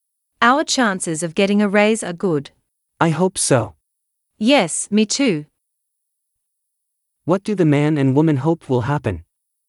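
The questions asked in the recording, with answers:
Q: What do the man and woman hope will happen?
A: They will get a raise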